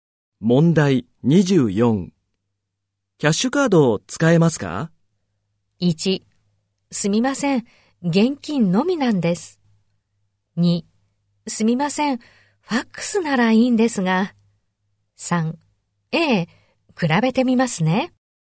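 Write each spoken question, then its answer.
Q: キャッシュカードを使えますか?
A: 1: すみません、現金のみなんです。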